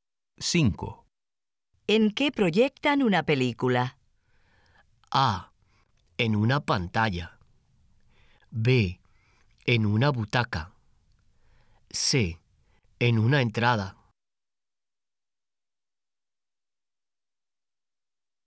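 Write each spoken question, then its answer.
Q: ¿En qué proyectan una película?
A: A: En una pantalla.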